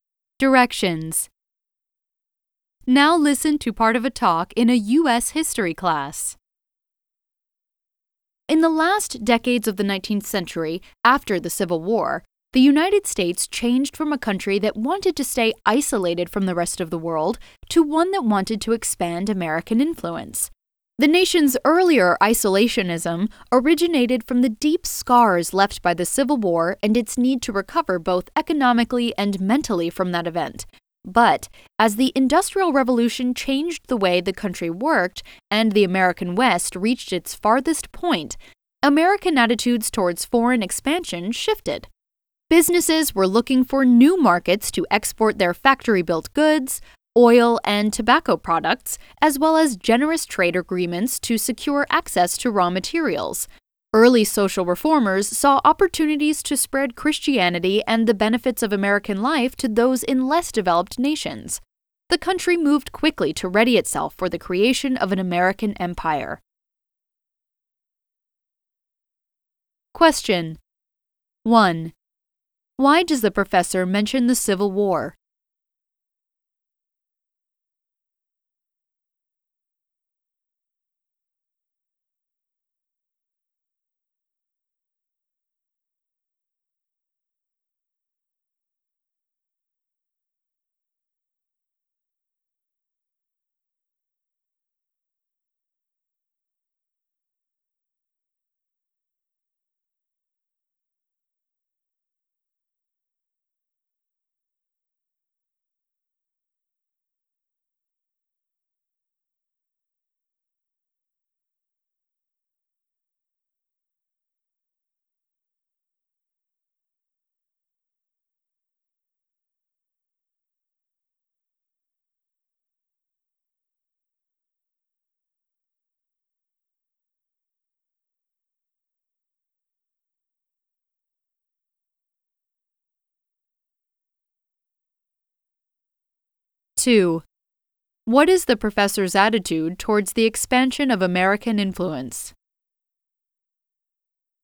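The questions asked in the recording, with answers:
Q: Why does the professor mention the Civil War?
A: To explain why the country was isolationist at first: it had to recover economically and mentally from the war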